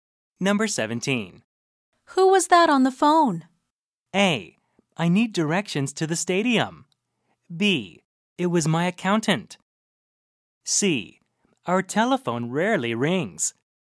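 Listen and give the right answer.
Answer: B: It was my accountant.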